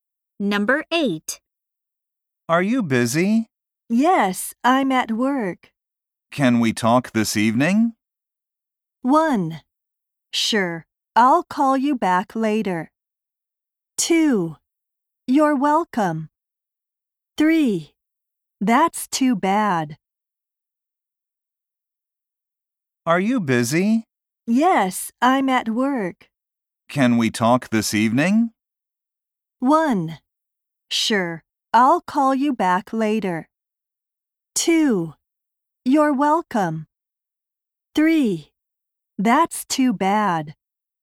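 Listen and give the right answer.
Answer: 1: Sure, I'll call you back later.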